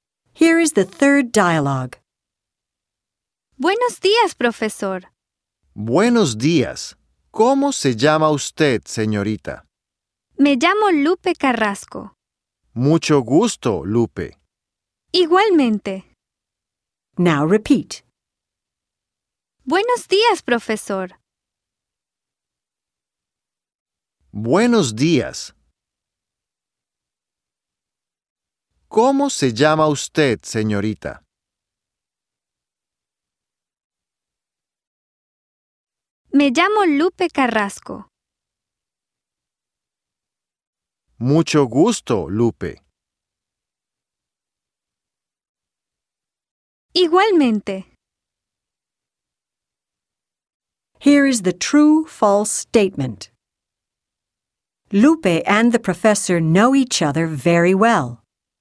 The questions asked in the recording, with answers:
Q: Lupe and the professor know each other very well.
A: You should have circled the letter F.